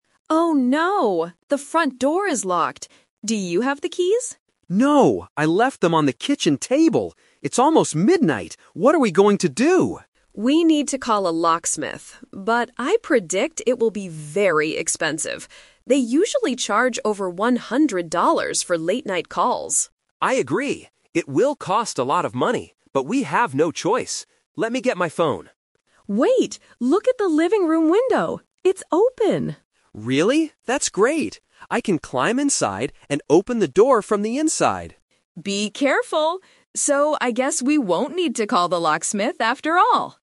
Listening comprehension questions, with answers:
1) Where did the husband leave the keys?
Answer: On the kitchen table.

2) What does the wife predict about the locksmith?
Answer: He will ask for a lot of money.

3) How will they get into the house at the end?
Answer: The husband will climb through a window.

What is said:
Wife: Oh no! The front door is locked. Do you have the keys?
Husband: No, I left them on the kitchen table. It's almost midnight! What are we going to do?
Wife: We need to call a locksmith. But I predict it will be very expensive. They usually charge over 100 dollars for late-night calls.
Husband: I agree. It will cost a lot of money, but we have no choice. Let me get my phone.
Wife: Wait! Look at the living room window. It's open!
Husband: Really? That's great! I can climb inside and open the door from the inside.